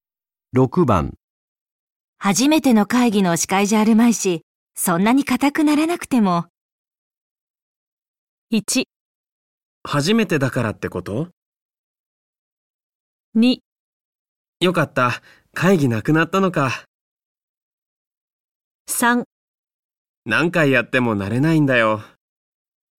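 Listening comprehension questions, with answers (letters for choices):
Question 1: 女:初めての会議の司会じゃあるまいし、そんなに硬くならなくても???。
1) 初めてだからってこと?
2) よかった。会議無くなったのか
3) 何回やっても慣れないんだよ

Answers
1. 3

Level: N1级别听力题库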